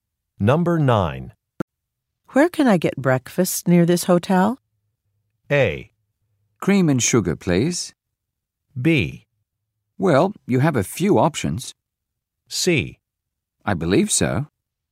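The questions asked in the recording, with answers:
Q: Where can I get breakfast near this hotel?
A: B: Well, you have a few options.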